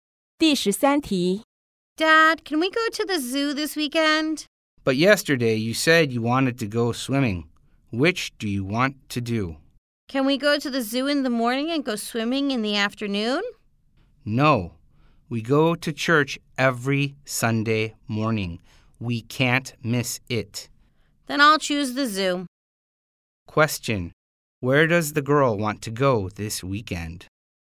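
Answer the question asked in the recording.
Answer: The zoo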